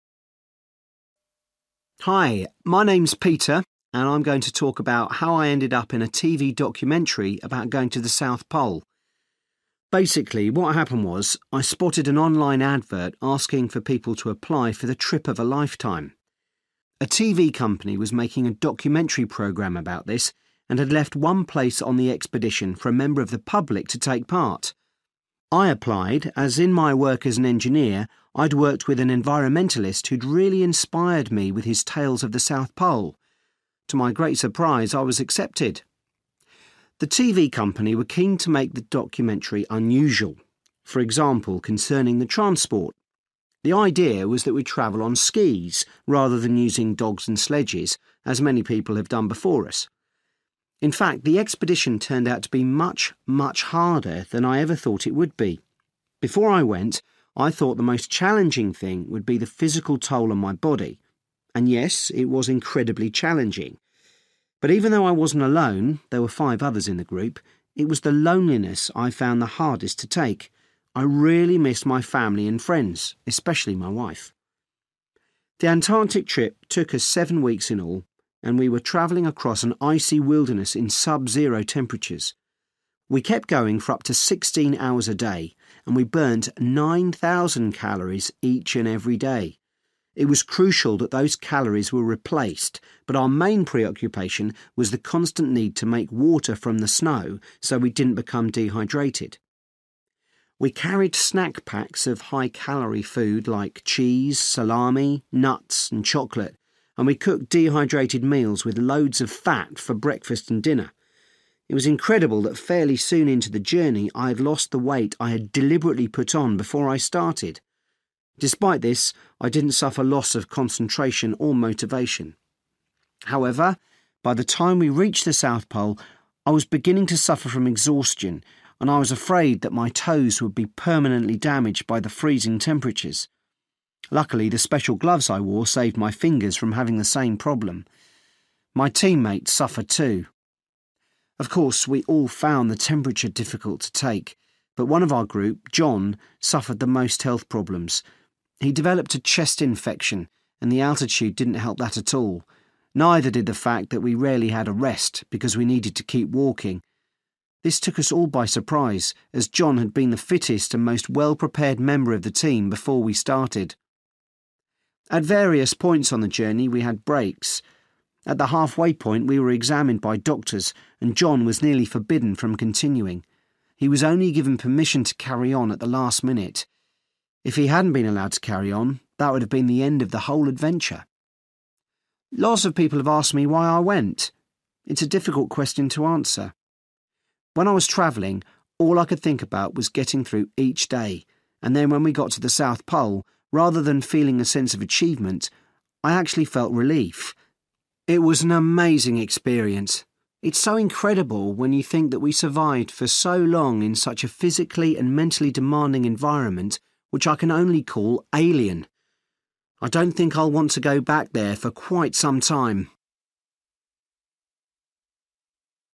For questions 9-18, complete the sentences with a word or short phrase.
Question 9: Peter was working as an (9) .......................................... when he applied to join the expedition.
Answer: engineer

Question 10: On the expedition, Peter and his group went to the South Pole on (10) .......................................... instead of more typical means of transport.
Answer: skis

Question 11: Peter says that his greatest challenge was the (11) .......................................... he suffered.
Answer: loneliness/lonelyness

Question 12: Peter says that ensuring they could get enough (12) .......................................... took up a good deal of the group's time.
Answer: water

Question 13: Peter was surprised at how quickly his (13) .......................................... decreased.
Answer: weight

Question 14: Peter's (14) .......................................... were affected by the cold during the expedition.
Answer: toes

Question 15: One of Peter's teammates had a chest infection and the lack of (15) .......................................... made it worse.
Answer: rest

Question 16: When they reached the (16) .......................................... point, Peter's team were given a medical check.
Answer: half(-)way

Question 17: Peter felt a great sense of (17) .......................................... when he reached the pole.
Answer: relief

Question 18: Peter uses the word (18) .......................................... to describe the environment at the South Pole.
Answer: alien

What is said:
Hi, my name's Peter and I'm going to talk about how I ended up in a TV documentary about going to the South Pole. Basically, what happened was, I spotted an online advert asking for people to apply for the trip of a lifetime. A TV company was making a documentary programme about this, and had left one place on the expedition for a member of the public to take part. I applied as, in my work as an engineer, I'd worked with an environmentalist who'd really inspired me with his tales of the South Pole. To my great surprise, I was accepted.
The TV company were keen to make the documentary unusual ... for example concerning the transport. The idea was that we'd travel on skis, rather than using dogs and sledges, as many people have done before us.
In fact, the expedition turned out to be much, much harder than I ever thought it would be. Before I went, I thought the most challenging thing would be the physical toll on my body. And yes, it was incredibly challenging. But even though I wasn't alone – there were five others in the group – it was the loneliness I found the hardest to take. I really missed my family and friends, especially my wife.
The Antarctic trip took us seven weeks in all and we were travelling across an icy wilderness in sub-zero temperatures. We kept going for up to sixteen hours a day and we burnt nine thousand calories each and every day. It was crucial that those calories were replaced but our main preoccupation was the constant need to make water from the snow so we didn't become dehydrated.
We carried snack-packs of high-calorie food like cheese, salami, nuts and chocolate, and we cooked dehydrated meals with loads of fat for breakfast and dinner. It was incredible that fairly soon into the journey I'd lost the weight I had deliberately put on before I started. Despite this, I didn't suffer loss of concentration or motivation.
However, by the time we reached the South Pole I was beginning to suffer from exhaustion, and I was afraid that my toes would be permanently damaged by the freezing temperatures. Luckily the special gloves I wore saved my fingers from having the same problem.
My team-mates suffered too. Of course, we all found the temperature difficult to take, but one of our group, John, suffered the most health problems. He developed a chest infection and the altitude didn't help that at all – neither did the fact that we rarely had a rest, because we needed to keep walking. This took us all by surprise, as John had been the fittest and most well-prepared member of the team before we started.
At various points on the journey we had breaks. At the halfway point we were examined by doctors and John was nearly forbidden from continuing. He was only given permission to carry on at the last minute. If he hadn't been allowed to carry on, that would have been the end of the whole adventure.
Lots of people have asked me why I went. It's a difficult question to answer. When I was travelling, all I could think about was getting through each day, and then when we got to the South Pole, rather than feeling a sense of achievement, I actually felt relief. It was an amazing experience. It's so incredible when you think that we survived for so long in such a physically and mentally demanding environment, which I can only call 'alien'. I don't think I'll want to go back there for quite some time!

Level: B2